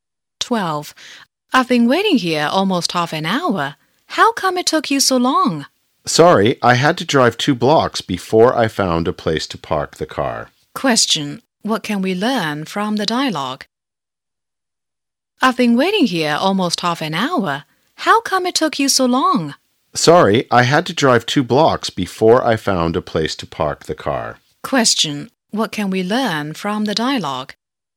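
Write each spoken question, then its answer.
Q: Question: What can we learn from the dialogue?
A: The late speaker had trouble finding a parking place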